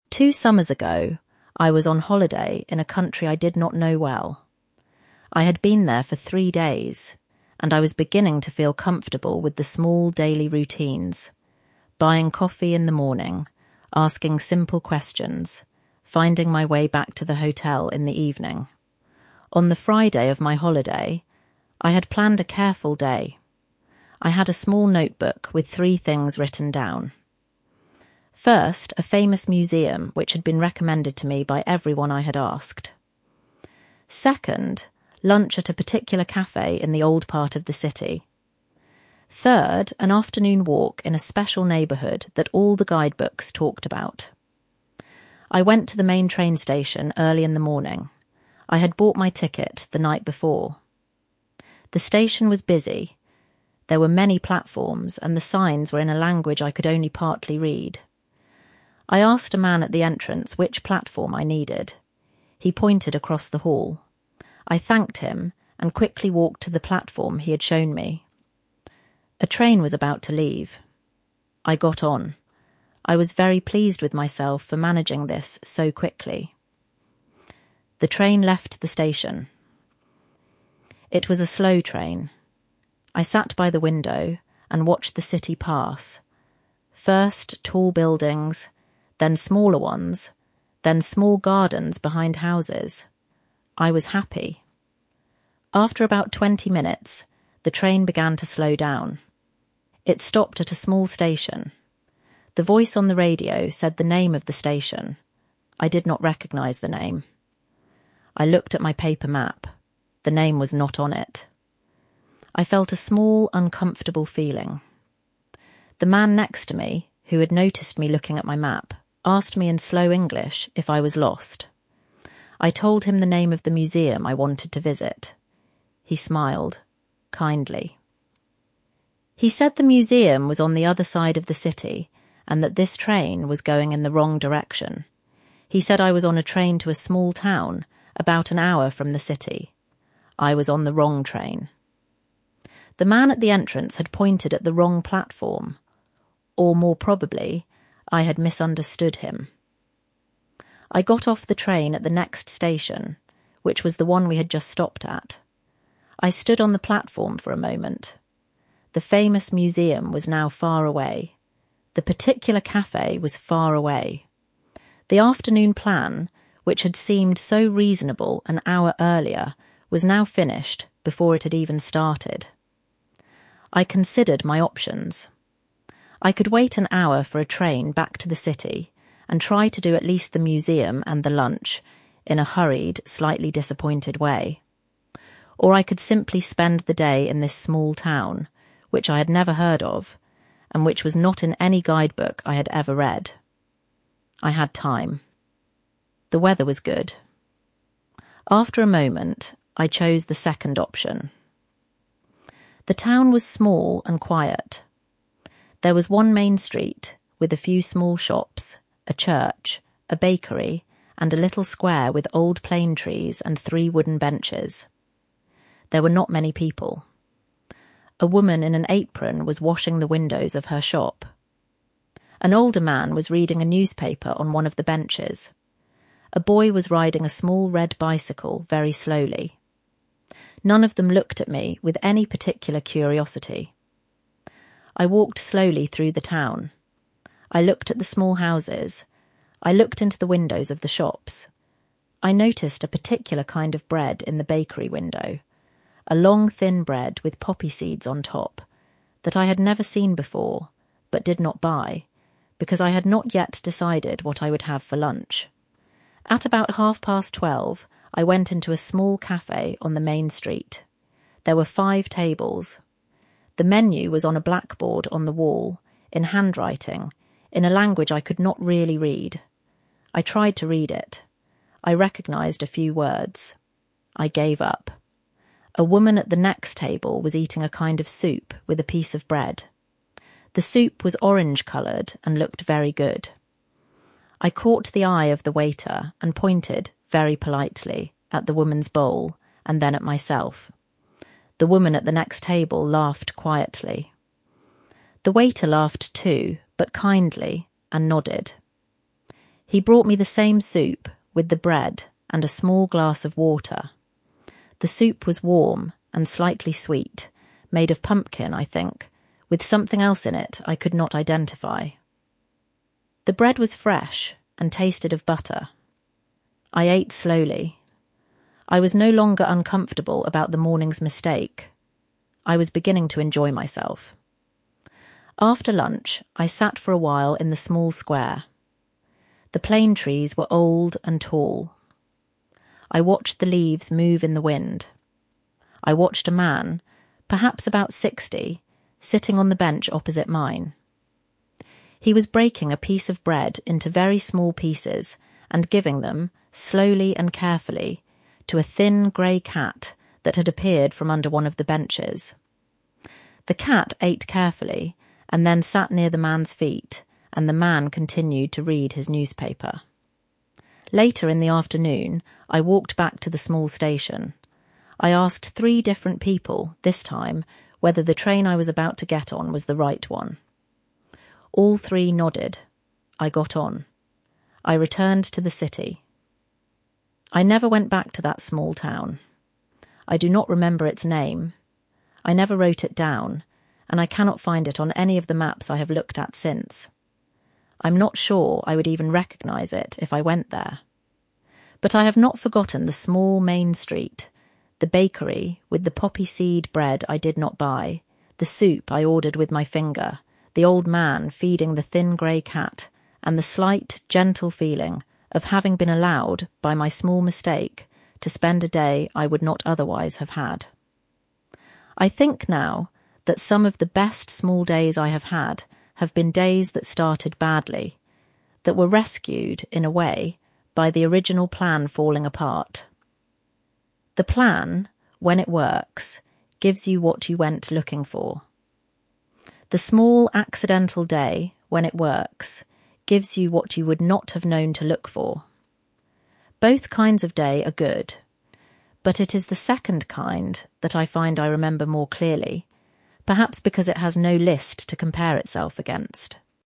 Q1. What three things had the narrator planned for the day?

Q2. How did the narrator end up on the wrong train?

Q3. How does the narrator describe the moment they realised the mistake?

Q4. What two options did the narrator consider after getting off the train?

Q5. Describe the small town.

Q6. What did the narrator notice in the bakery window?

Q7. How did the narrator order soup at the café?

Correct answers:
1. (1) A famous museum recommended by everyone they had asked.
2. He pointed across the hall.
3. They felt 'a small uncomfortable feeling'.
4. They chose the second option.
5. Small and quiet.
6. long, thin, with poppy seeds on top
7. pointed politely at the woman's bowl, then at themselves

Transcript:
Two summers ago, I was on holiday in a country I did not know well. I had been there for three days, and I was beginning to feel comfortable with the small daily routines — buying coffee in the morning, asking simple questions, finding my way back to the hotel in the evening.
On the Friday of my holiday, I had planned a careful day. I had a small notebook with three things written down. First, a famous museum, which had been recommended to me by everyone I had asked. Second, lunch at a particular café in the old part of the city. Third, an afternoon walk in a special neighbourhood that all the guidebooks talked about.
I went to the main train station early in the morning. I had bought my ticket the night before. The station was busy. There were many platforms, and the signs were in a language I could only partly read. I asked a man at the entrance which platform I needed. He pointed across the hall. I thanked him, and quickly walked to the platform he had shown me. A train was about to leave. I got on.
I was very pleased with myself for managing this so quickly.
The train left the station. It was a slow train. I sat by the window, and watched the city pass — first tall buildings, then smaller ones, then small gardens behind houses. I was happy.
After about twenty minutes, the train began to slow down. It stopped at a small station. The voice on the radio said the name of the station. I did not recognise the name. I looked at my paper map. The name was not on it.
I felt a small uncomfortable feeling.
The man next to me, who had noticed me looking at my map, asked me in slow English if I was lost. I told him the name of the museum I wanted to visit. He smiled, kindly. He said the museum was on the other side of the city, and that this train was going in the wrong direction. He said I was on a train to a small town, about an hour from the city.
The man at the entrance had pointed at the wrong platform — or, more probably, I had misunderstood him.
I got off the train at the next station, which was the one we had just stopped at. I stood on the platform for a moment. The famous museum was now far away. The particular café was far away. The afternoon plan, which had seemed so reasonable an hour earlier, was now finished before it had even started.
I considered my options. I could wait an hour for a train back to the city, and try to do at least the museum and the lunch, in a hurried, slightly disappointed way. Or I could simply spend the day in this small town, which I had never heard of, and which was not in any guidebook I had ever read. I had time. The weather was good. After a moment, I chose the second option.
The town was small and quiet. There was one main street, with a few small shops, a church, a bakery, and a little square with old plane trees and three wooden benches. There were not many people. A woman in an apron was washing the windows of her shop. An older man was reading a newspaper on one of the benches. A boy was riding a small red bicycle very slowly. None of them looked at me with any particular curiosity.
I walked slowly through the town. I looked at the small houses. I looked into the windows of the shops. I noticed a particular kind of bread in the bakery window — a long, thin bread with poppy seeds on top — that I had never seen before, but did not buy, because I had not yet decided what I would have for lunch.
At about half past twelve, I went into a small café on the main street. There were five tables. The menu was on a blackboard on the wall, in handwriting, in a language I could not really read. I tried to read it. I recognised a few words. I gave up.
A woman at the next table was eating a kind of soup, with a piece of bread. The soup was orange-coloured and looked very good. I caught the eye of the waiter and pointed, very politely, at the woman's bowl, and then at myself. The waiter laughed too, but kindly, and nodded.
He brought me the same soup, with the bread, and a small glass of water. The soup was warm and slightly sweet, made of pumpkin, I think, with something else in it I could not identify. The bread was fresh, and tasted of butter. I ate slowly. I was no longer uncomfortable about the morning's mistake.
After lunch, I sat for a while in the small square. The plane trees were old and tall. I watched the leaves move in the wind. I watched a man, perhaps about sixty, sitting on the bench opposite mine. He was breaking a piece of bread into very small pieces and giving them, slowly and carefully, to a thin grey cat that had appeared from under one of the benches. The cat ate carefully, and then sat near the man's feet, and the man continued to read his newspaper.
Later in the afternoon, I walked back to the small station. I asked three different people, this time, whether the train I was about to get on was the right one. All three nodded. I got on. I returned to the city.
I never went back to that small town. I do not remember its name — I never wrote it down, and I cannot find it on any of the maps I have looked at since. I am not sure I would even recognise it if I went there. But I have not forgotten the small main street, the bakery with the poppy-seed bread I did not buy, the soup I ordered with my finger, the old man feeding the thin grey cat, and the slight, gentle feeling of having been allowed, by my small mistake, to spend a day I would not otherwise have had.
I think now that some of the best small days I have had have been days that started badly — that were rescued, in a way, by the original plan falling apart.
'Some of the best small days I have had have been days that started badly — that were rescued, in a way, by the original plan falling apart. The plan, when it works, gives you what you went looking for. The small accidental day, when it works, gives you what you would not have known to look for. Both kinds of day are good. But it is the second kind that I find I remember more clearly, perhaps because it has no list to compare itself against.'